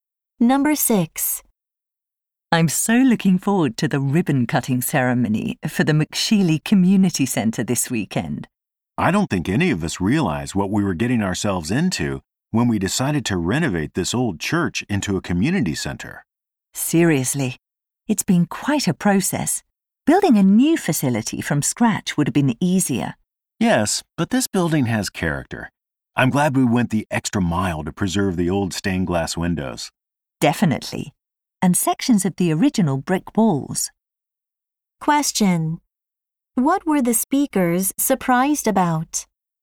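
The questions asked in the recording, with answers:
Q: What were the speakers surprised about?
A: How difficult it was to renovate the old church into a community center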